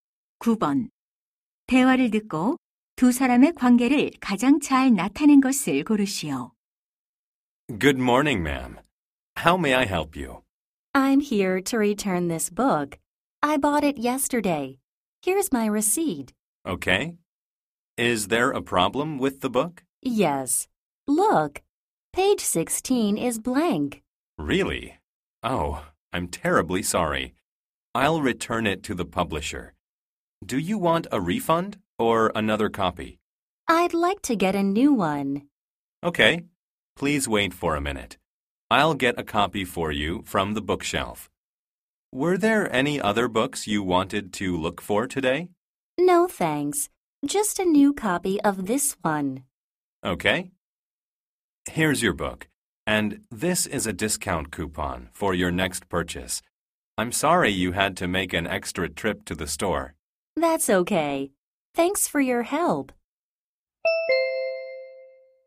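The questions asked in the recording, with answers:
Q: 대화를 듣고 두 사람의 관계를 가장 잘 나타낸 것을 고르시오.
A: 서점 직원 - 손님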